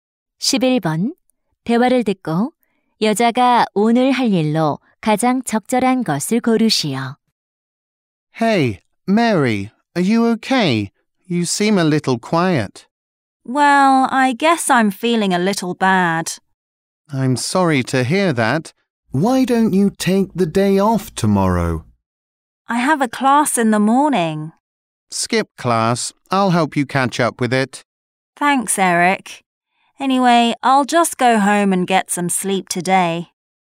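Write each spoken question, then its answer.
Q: 대화를 듣고 여자가 오늘 할 일로 가장 적절한 것을 고르시오.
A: 집에 가서 잠자기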